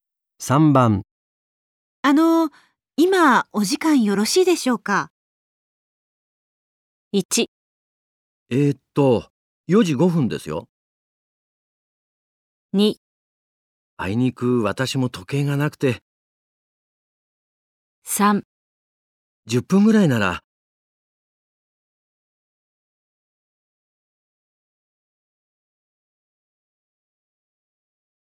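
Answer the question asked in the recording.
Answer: 3: 10分ぐらいなら。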